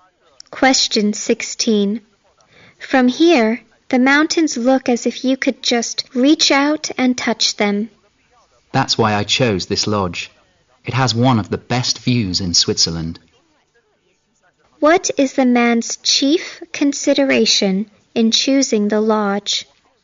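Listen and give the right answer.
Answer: The view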